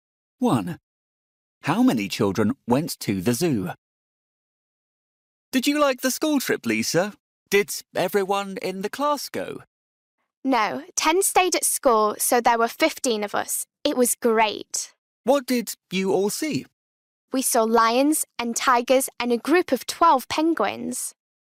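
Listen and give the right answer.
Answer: 15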